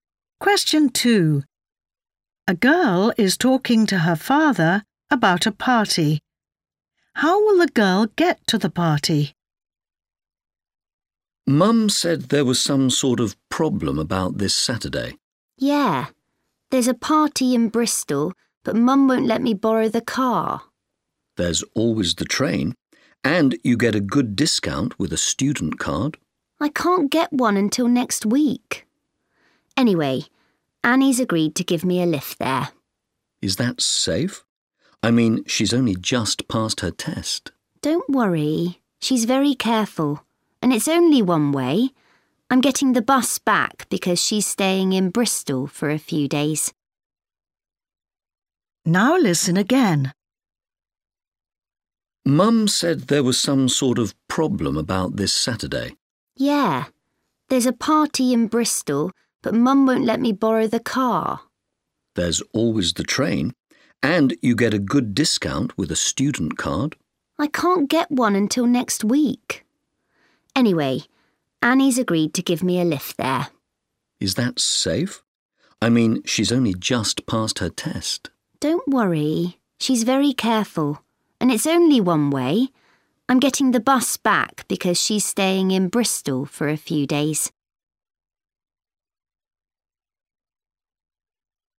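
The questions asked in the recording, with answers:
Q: How will the girl get to the party?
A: Annie will give her a lift by car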